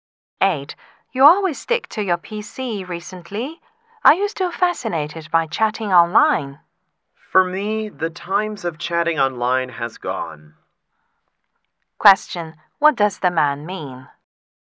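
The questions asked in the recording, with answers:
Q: What does the man mean?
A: He no longer chats online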